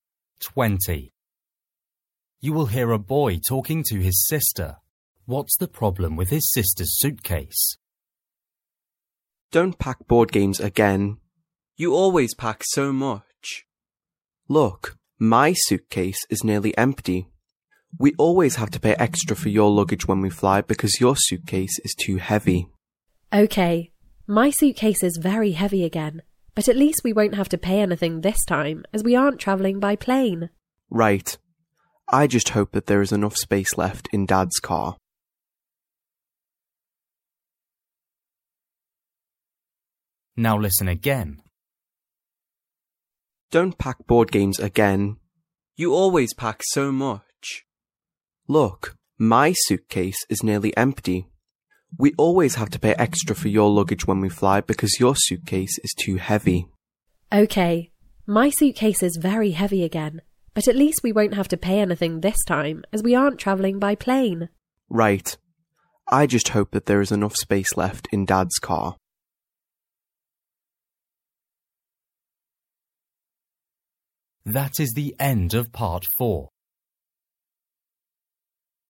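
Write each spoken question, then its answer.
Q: What's the problem with his sister's suitcase?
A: it is too heavy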